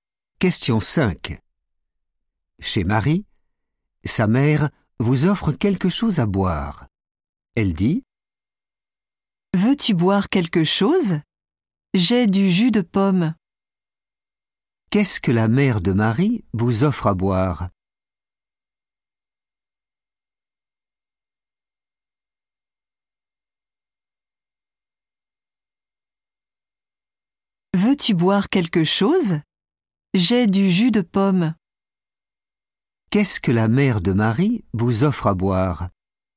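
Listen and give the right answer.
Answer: du jus de pomme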